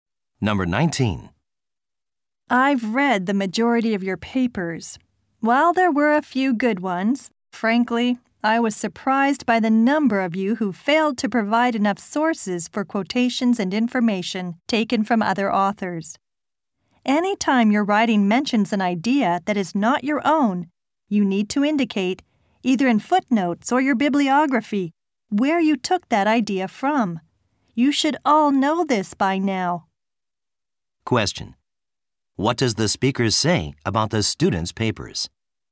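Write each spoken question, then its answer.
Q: What does the speaker say about the students' papers?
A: Many did not give enough sources for borrowed ideas and quotations.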